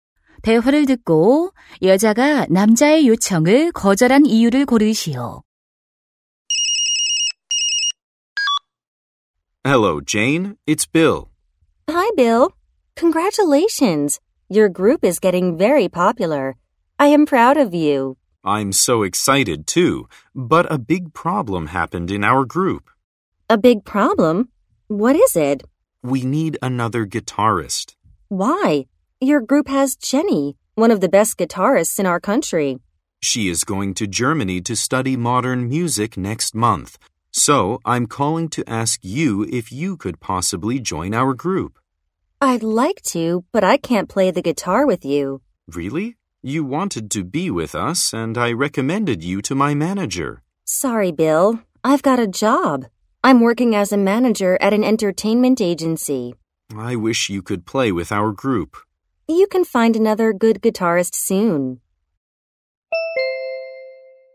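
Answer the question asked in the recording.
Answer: 연예 기획사에 매니저로 취직해서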